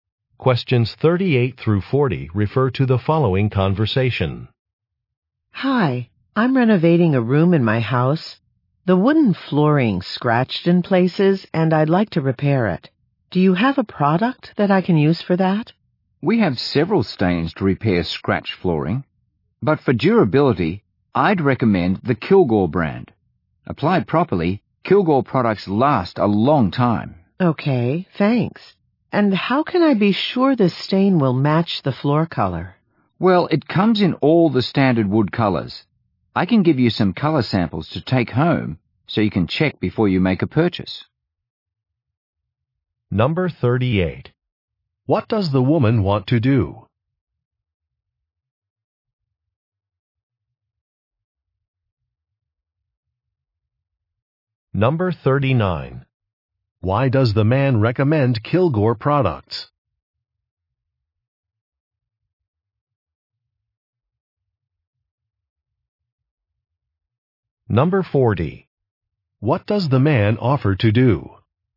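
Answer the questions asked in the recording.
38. Repair her scratched wooden floor
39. They are durable and last a long time
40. Give her color samples to take home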